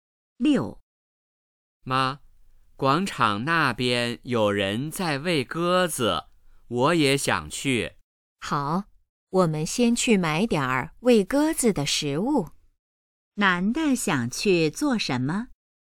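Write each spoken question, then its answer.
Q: 男的想去做什么?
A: 去广场喂鸽子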